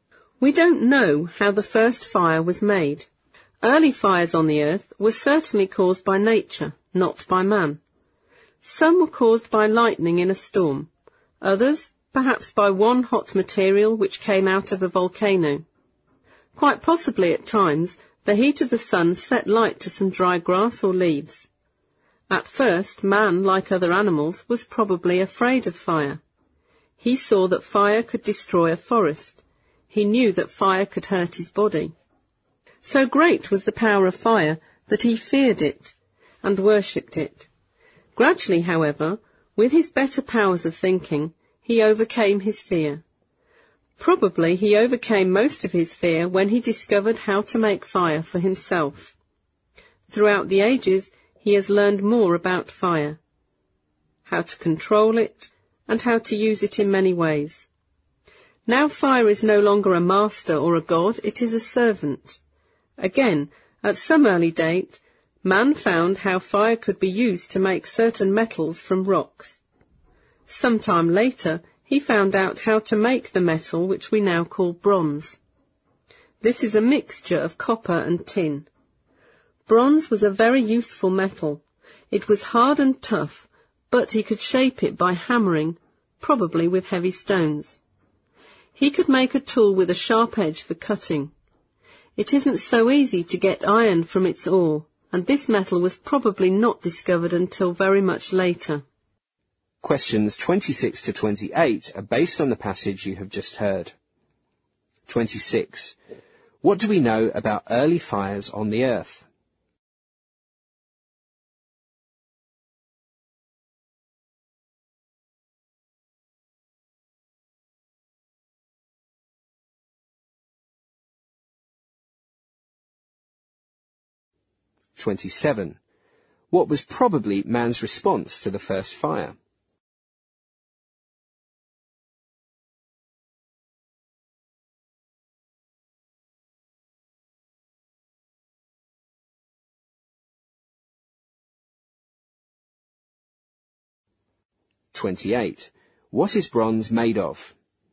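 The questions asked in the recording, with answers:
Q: What do we know about early fires on the earth?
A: They were caused by nature, not by man

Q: What was probably man's response to the first fire?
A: He was afraid of it

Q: What is bronze made of?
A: Copper and tin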